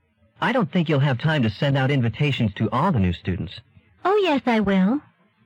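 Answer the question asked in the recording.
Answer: She is sure she will have time to send invitations to all the new students.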